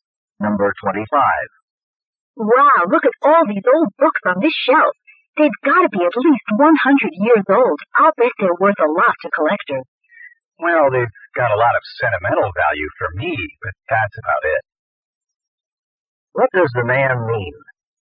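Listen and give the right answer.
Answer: The books have sentimental value but aren't worth much money.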